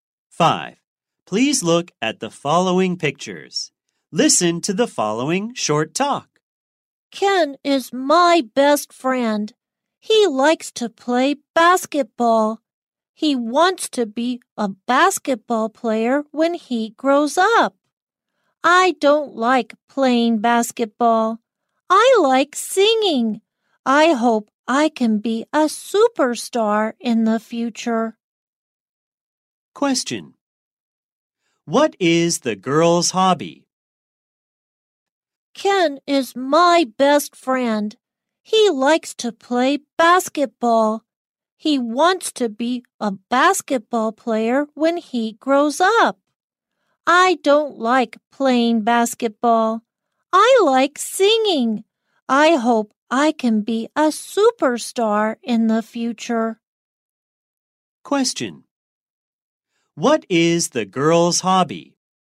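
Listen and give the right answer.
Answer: Singing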